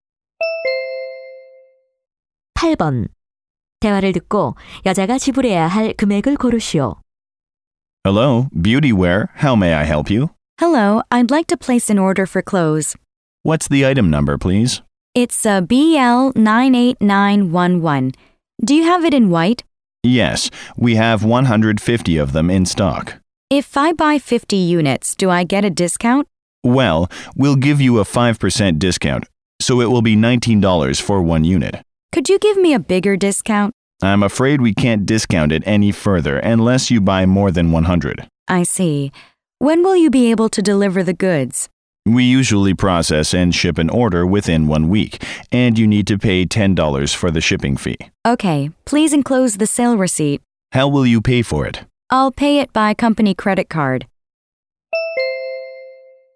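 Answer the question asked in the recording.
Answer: $960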